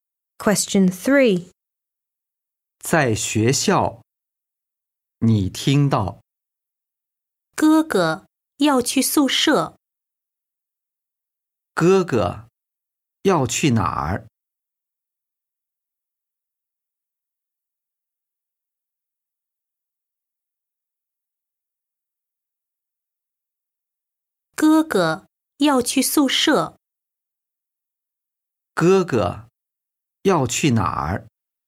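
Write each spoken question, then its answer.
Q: 哥哥要去哪儿?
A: 宿舍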